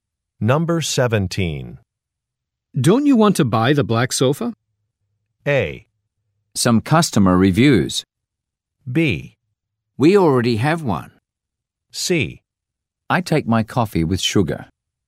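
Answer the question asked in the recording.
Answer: B: We already have one.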